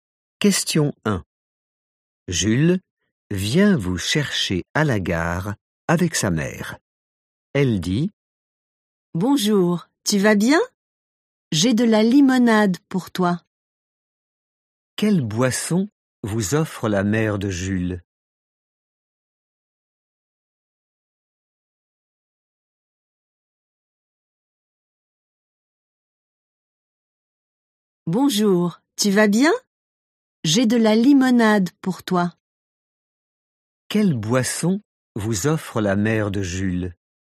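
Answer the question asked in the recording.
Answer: de la limonade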